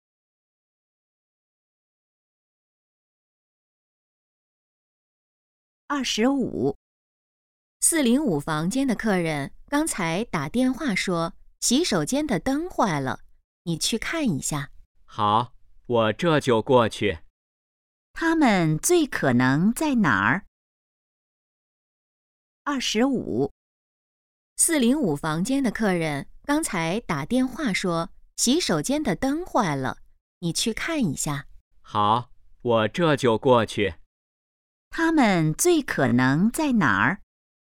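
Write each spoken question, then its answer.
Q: 他们最可能在哪儿?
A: 宾馆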